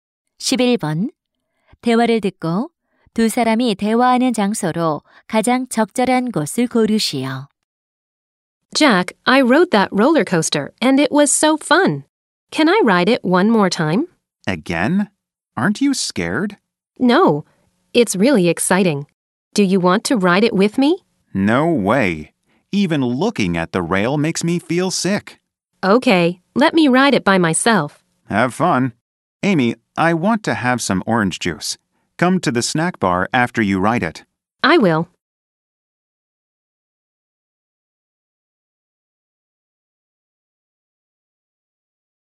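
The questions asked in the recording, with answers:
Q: 대화를 듣고 두 사람이 대화하는 장소로 가장 적절한 곳을 고르시오.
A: 놀이공원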